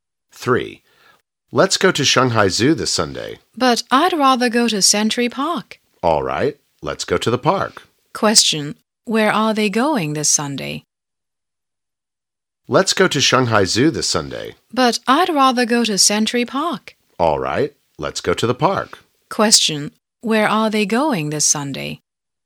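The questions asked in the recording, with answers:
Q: Where are they going this Sunday?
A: Century Park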